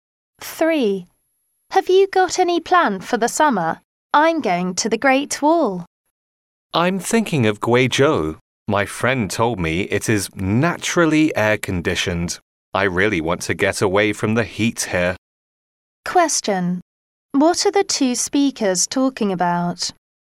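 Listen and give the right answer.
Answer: Their summer travel plans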